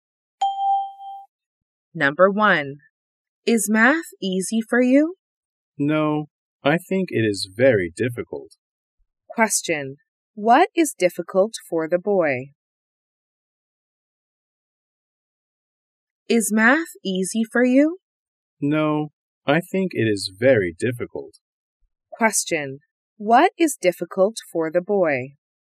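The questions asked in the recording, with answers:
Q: What is difficult for the boy?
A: Math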